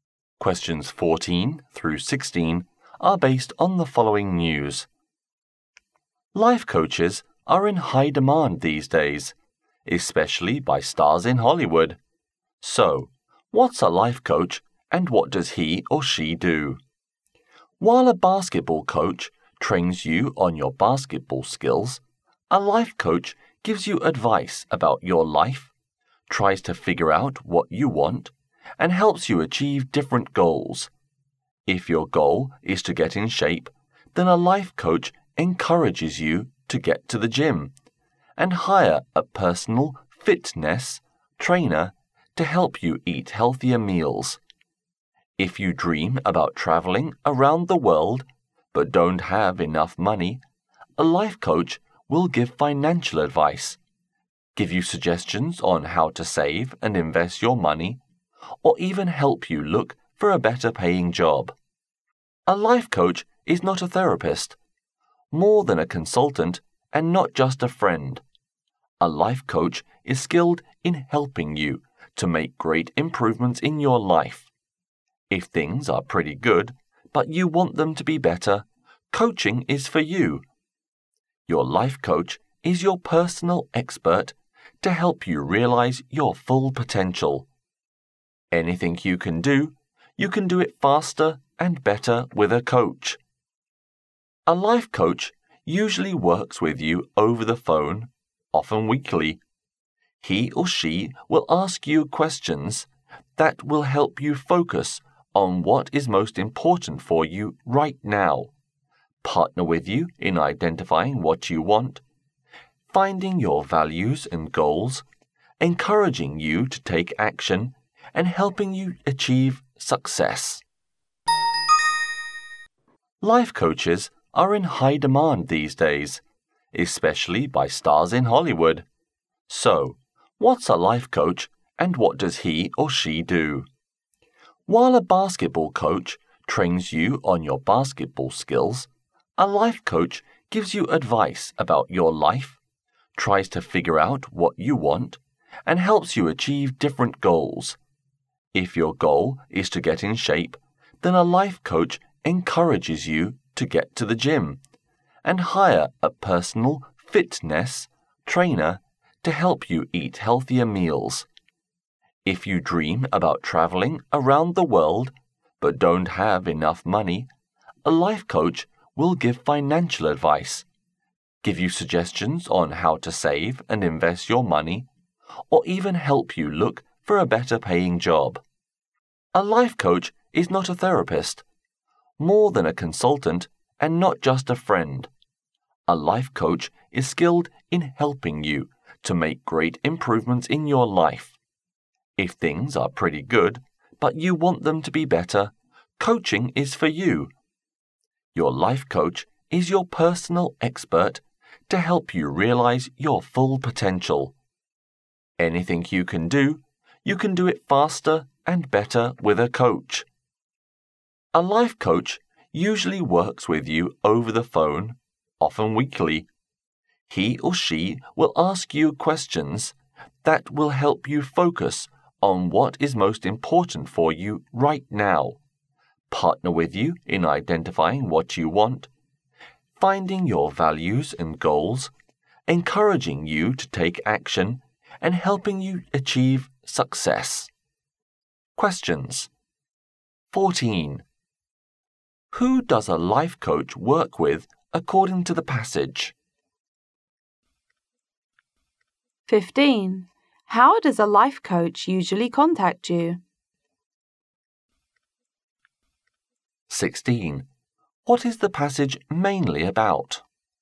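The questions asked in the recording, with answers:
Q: How does a life coach usually contact you?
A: Over the phone, often weekly

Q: What is the passage mainly about?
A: What a life coach does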